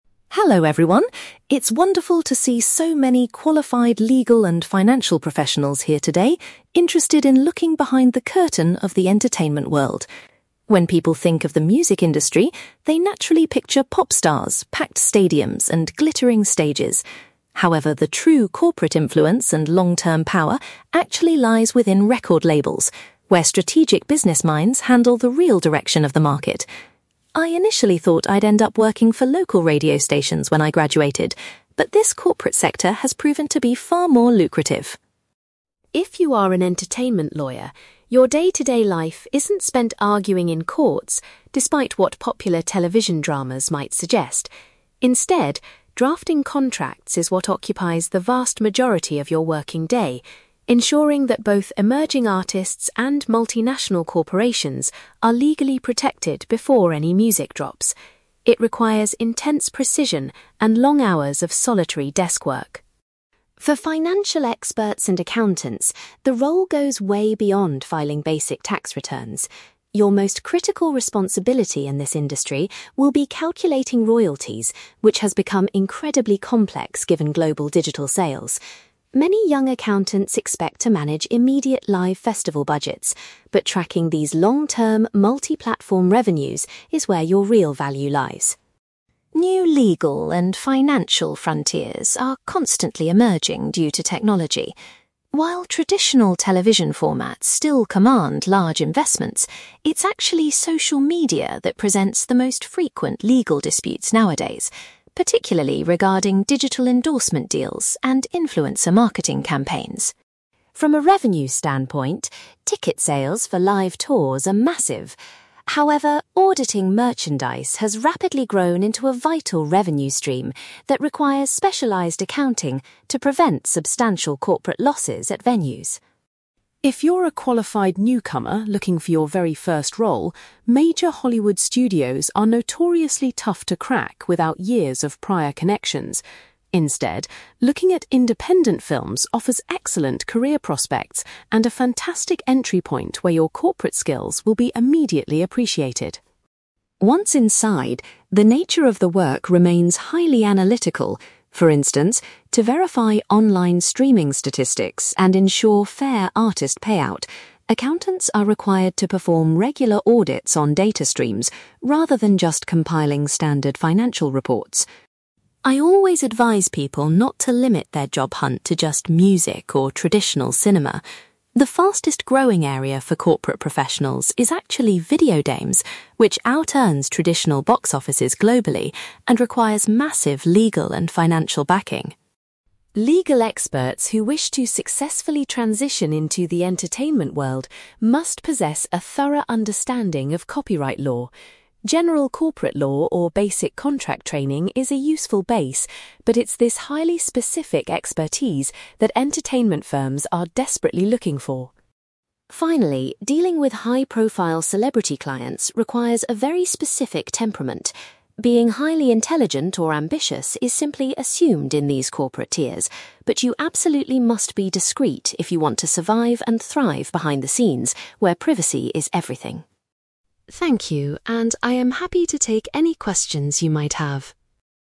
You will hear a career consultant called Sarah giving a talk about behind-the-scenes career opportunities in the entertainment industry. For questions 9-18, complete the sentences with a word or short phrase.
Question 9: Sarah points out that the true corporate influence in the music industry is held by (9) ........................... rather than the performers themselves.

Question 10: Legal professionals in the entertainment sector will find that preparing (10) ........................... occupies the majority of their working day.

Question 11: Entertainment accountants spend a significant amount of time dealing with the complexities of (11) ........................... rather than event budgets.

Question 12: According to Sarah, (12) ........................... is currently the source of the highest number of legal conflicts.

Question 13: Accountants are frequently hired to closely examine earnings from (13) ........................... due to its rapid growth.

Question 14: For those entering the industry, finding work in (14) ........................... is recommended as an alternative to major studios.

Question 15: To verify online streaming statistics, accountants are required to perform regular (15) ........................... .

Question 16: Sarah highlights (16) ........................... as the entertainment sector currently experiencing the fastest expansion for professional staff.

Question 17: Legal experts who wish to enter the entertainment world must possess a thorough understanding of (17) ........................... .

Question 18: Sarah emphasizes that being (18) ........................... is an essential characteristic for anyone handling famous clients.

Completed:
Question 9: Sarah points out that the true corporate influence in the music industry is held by record labels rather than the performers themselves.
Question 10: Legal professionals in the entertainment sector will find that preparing contracts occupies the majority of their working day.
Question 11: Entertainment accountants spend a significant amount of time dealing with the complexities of royalties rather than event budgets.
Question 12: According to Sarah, social media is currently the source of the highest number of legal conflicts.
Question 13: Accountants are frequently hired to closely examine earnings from merchandise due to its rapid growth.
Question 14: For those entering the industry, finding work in independent films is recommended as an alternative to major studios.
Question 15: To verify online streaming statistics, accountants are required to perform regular audits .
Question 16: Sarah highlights video games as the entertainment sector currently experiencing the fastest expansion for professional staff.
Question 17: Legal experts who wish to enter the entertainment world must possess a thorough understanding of copyright law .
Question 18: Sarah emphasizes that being discreet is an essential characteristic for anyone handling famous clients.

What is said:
Sarah: Hello everyone. It's wonderful to see so many qualified legal and financial professionals here today interested in looking behind the curtain of the entertainment world. When people think of the music industry, they naturally picture pop stars, packed stadiums, and glittering stages. However, the true corporate influence and long-term power actually lies within record labels, where strategic business minds handle the real direction of the market. I initially thought I'd end up working for local radio stations when I graduated, but this corporate sector has proven to be far more lucrative.
If you are an entertainment lawyer, your day-to-day life isn't spent arguing in courts, despite what popular television dramas might suggest. Instead, drafting contracts is what occupies the vast majority of your working day, ensuring that both emerging artists and multinational corporations are legally protected before any music drops. It requires intense precision and long hours of solitary desk work.
For financial experts and accountants, the role goes way beyond filing basic tax returns. Your most critical responsibility in this industry will be calculating royalties, which has become incredibly complex given global digital sales. Many young accountants expect to manage immediate live festival budgets, but tracking these long-term, multi-platform revenues is where your real value lies.
New legal and financial frontiers are constantly emerging due to technology. While traditional television formats still command large investments, it's actually social media that presents the most frequent legal disputes nowadays, particularly regarding digital endorsement deals and influencer marketing campaigns.
From a revenue standpoint, ticket sales for live tours are massive. However, auditing merchandise has rapidly grown into a vital revenue stream that requires specialized accounting to prevent substantial corporate losses at venues.
If you're a qualified newcomer looking for your very first role, major Hollywood studios are notoriously tough to crack without years of prior connections. Instead, looking at independent films offers excellent career prospects and a fantastic entry point where your corporate skills will be immediately appreciated.
Once inside, the nature of the work remains highly analytical. For instance, to verify online streaming statistics and ensure fair artist payout, accountants are required to perform regular audits on data streams rather than just compiling standard financial reports.
I always advise people not to limit their job hunt to just music or traditional cinema. The fastest-growing area for corporate professionals is actually video games, which out-earns traditional box offices globally and requires massive legal and financial backing.
Legal experts who wish to successfully transition into the entertainment world must possess a thorough understanding of copyright law. General corporate law or basic contract training is a useful base, but it's this highly specific expertise that entertainment firms are desperately looking for.
Finally, dealing with high-profile celebrity clients requires a very specific temperament. Being highly intelligent or ambitious is simply assumed in these corporate tiers, but you absolutely must be discreet if you want to survive and thrive behind the scenes where privacy is everything.
Thank you, and I am happy to take any questions you might have.

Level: B2